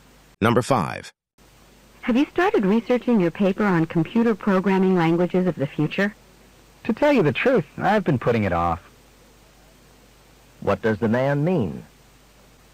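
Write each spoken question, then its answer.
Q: What does the man mean?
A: He hasn't started researching his paper yet.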